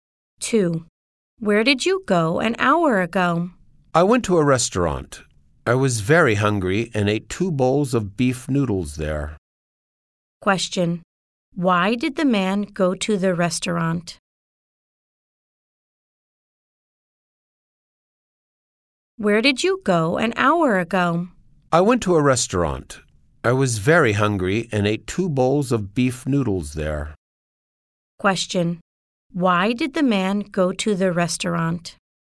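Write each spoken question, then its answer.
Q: Why did the man go to the restaurant?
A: He was very hungry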